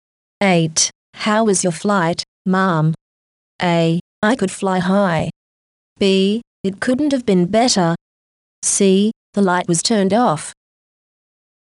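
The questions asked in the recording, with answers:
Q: How was your flight, ma'am?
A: B: It couldn't have been better.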